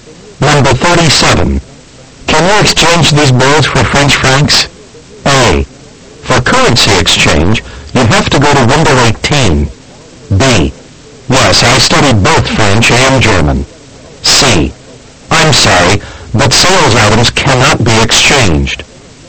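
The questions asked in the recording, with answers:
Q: Can you exchange these birds for French francs?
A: A: For currency exchange, you have to go to window 18.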